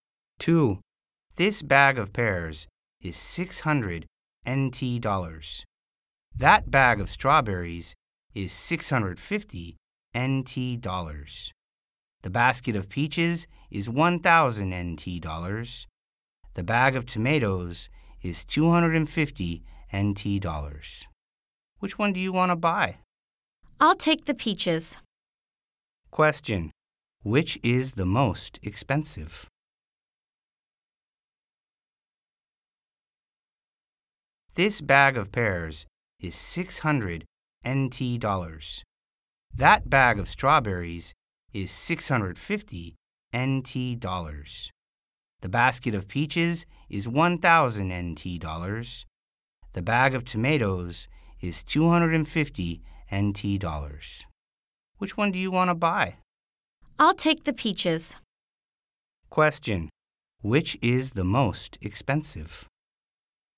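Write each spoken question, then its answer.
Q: Which is the most expensive?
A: The basket of peaches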